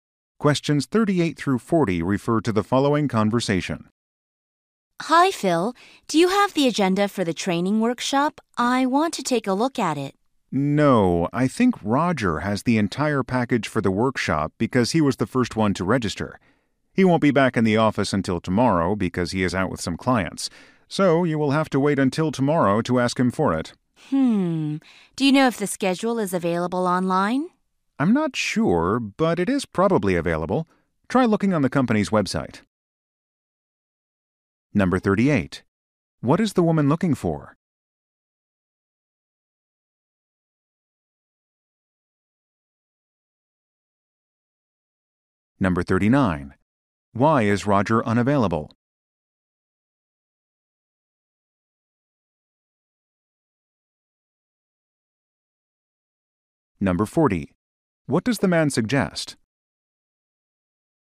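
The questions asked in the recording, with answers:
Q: What is the woman looking for?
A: The training workshop agenda

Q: Why is Roger unavailable?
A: He is out with clients

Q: What does the man suggest?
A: Checking the company's website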